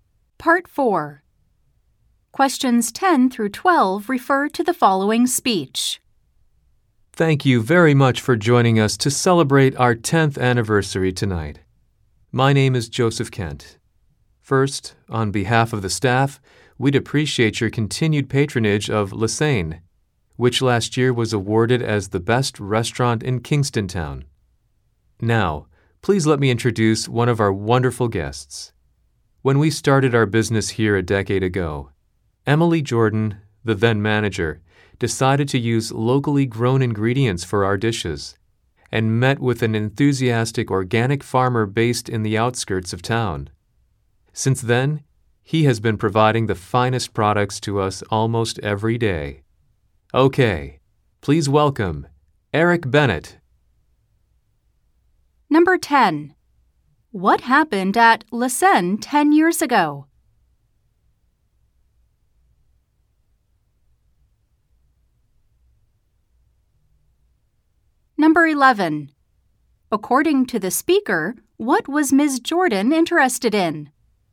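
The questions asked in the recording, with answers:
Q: What happened at La Seine 10 years ago?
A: The restaurant opened.

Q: Who is Eric Bennett?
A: A local organic farmer who supplies the restaurant.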